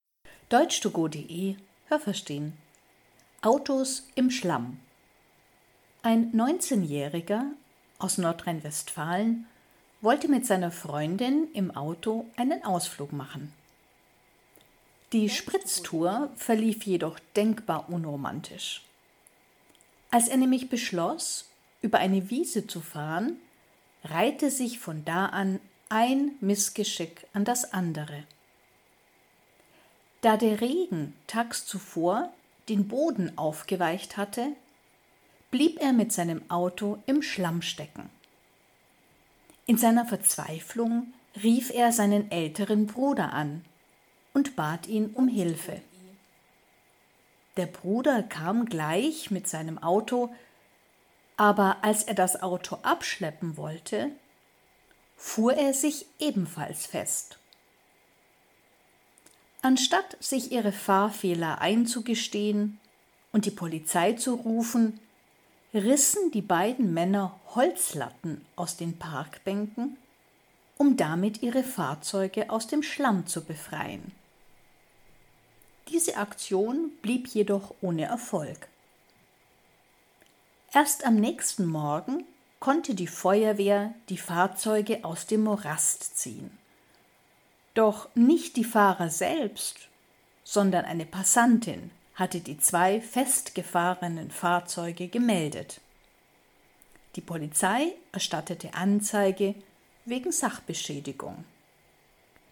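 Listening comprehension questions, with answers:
Haben Sie das gehört? Stimmt diese Aussage?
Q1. Ein junger Mann wollte mit seiner Freundin im Auto eine Spritztour machen.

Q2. Er fuhr durch eine Wiese, deren Boden aufgeweicht war.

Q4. Die Frau telefonierte mit ihrem Bruder und bat ihn um Hilfe.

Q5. Der Bruder kam und konnte das Auto seines Bruders abschleppen.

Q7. Sie versuchten, die Autos mit Holzlatten aus Parkbänken aus dem Schlamm zu befreien.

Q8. Erst am nächsten Morgen gelang es den beiden Männern, die Autos zu befreien.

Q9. Die Feuerwehr kam, weil die Freundin sie informiert hatte.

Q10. Die beiden Männer müssen mit einer Strafe wegen Sachbeschädigung rechnen.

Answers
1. richtig
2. richtig
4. falsch
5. falsch
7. richtig
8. falsch
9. falsch
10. richtig

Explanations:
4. Der Mann telefonierte mit seinem Bruder.
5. Als er das versuchte, blieb er mit seinem Auto ebenfalls stecken.
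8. Es gelang nicht ihnen, sondern der Feuerwehr.
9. Eine Passantin hatte die Feuerwehr benachrichtigt.

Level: B (mittel)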